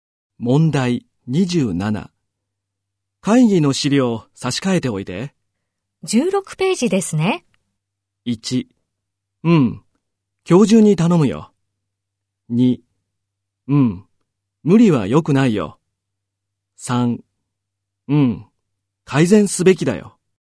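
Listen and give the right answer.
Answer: 1: うん。今日中に頼むよ。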